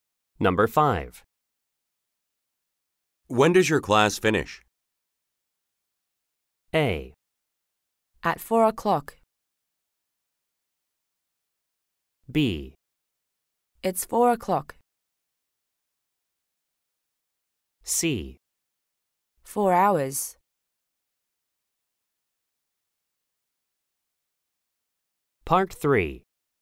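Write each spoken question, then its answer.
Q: When does your class finish?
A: A: At 4 o'clock.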